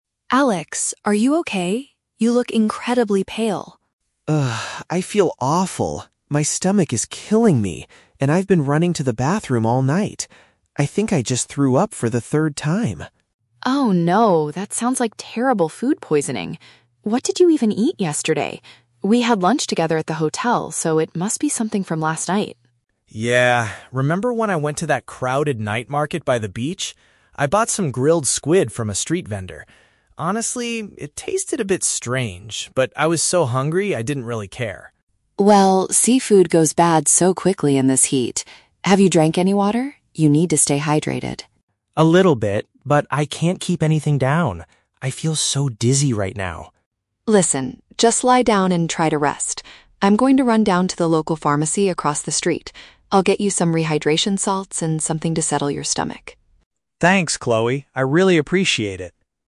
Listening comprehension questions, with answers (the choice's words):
Listen to the conversation between two hotel roommates and choose the correct answer (A, B, or C) for each question.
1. What is the most likely reason the man got sick?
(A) He ate seafood that was not fresh at a local market.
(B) He had an unhealthy lunch at the hotel restaurant.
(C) He drank dirty water while visiting the beach.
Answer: He ate seafood that was not fresh at a local market.

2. How is the man currently feeling?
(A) He is extremely thirsty but unable to find drinking water.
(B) He is suffering from severe stomach pain and feels unsteady.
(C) He has a very high fever and a terrible headache.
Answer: He is suffering from severe stomach pain and feels unsteady.

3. What does the woman promise to do next?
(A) Call a doctor to examine the man in their hotel room.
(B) Buy some medical supplies from a nearby store.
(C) Go out to buy some safe food for the man to eat.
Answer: Buy some medical supplies from a nearby store.

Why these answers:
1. The Key: The man mentions he ate "grilled squid from a street vendor" and the woman notes that "seafood goes bad so quickly." Option A correctly paraphrases this. The Trap (B): The hotel is mentioned, but the woman says they "had lunch together at the hotel" and implies that meal was perfectly fine. Plausible (C): The beach is mentioned (the market was "by the beach") and water is discussed later, but contaminated water is not the cause of his illness.
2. The Key: The man says "My stomach is killing me" and "I feel so dizzy." Option B paraphrases these exact symptoms (stomach pain and feeling unsteady). The Trap (A): Water is mentioned, but he isn't unable to find it; he says he drank "a little bit, but I can't keep anything down." Plausible (C): Fever and headache are common symptoms of food poisoning, but the man never actually mentions having them in the audio.
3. The Key: The woman says she will "run down to the local pharmacy" to get "rehydration salts and something to settle your stomach." Option B is a perfect synonym for this action. The Trap (C): Food and street vendors are mentioned earlier in the conversation, but she is definitely not going to buy him more food right now. Plausible (A): Calling a doctor is a very logical thing to do when someone is sick, but it is never mentioned in this conversation.

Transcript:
Chloe: Alex, are you okay? You look incredibly pale.
Alex: Ugh... I feel awful. My stomach is killing me, and I've been running to the bathroom all night. I think I just threw up for the third time.
Chloe: Oh no, that sounds like terrible food poisoning! What did you even eat yesterday? We had lunch together at the hotel, so it must be something from last night.
Alex: Yeah... remember when I went to that crowded night market by the beach? I bought some grilled squid from a street vendor. Honestly, it tasted a bit strange, but I was so hungry I didn't really care.
Chloe: Well, seafood goes bad so quickly in this heat. Have you drank any water? You need to stay hydrated.
Alex: A little bit, but I can't keep anything down. I feel so dizzy right now.
Chloe: Listen, just lie down and try to rest. I'm going to run down to the local pharmacy across the street. I'll get you some rehydration salts and something to settle your stomach.
Alex: Thanks, Chloe. I really appreciate it.